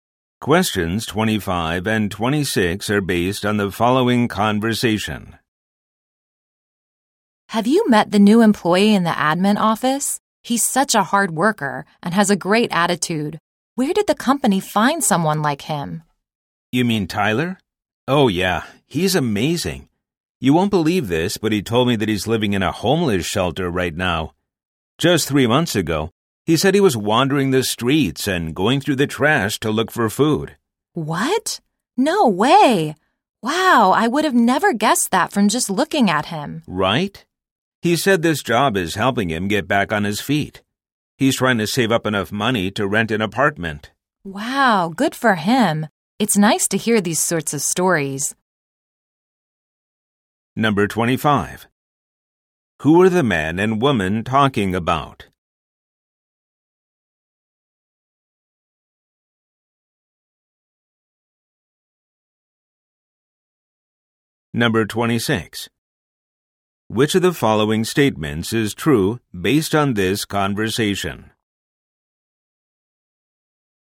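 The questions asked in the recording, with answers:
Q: Who are the man and woman talking about?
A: Tyler, a new employee in the admin office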